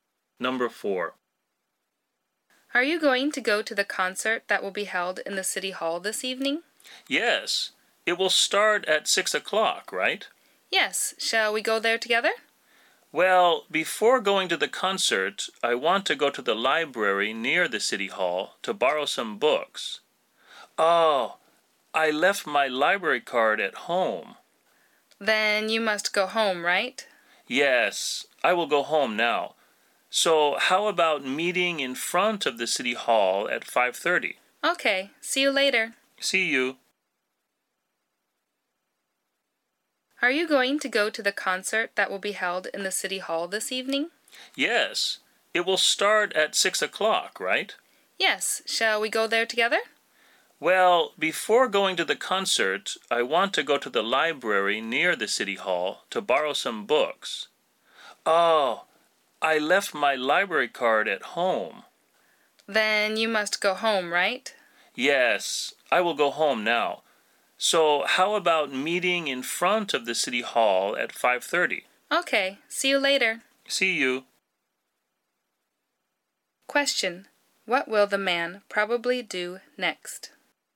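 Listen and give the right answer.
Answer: Go home to get his library card.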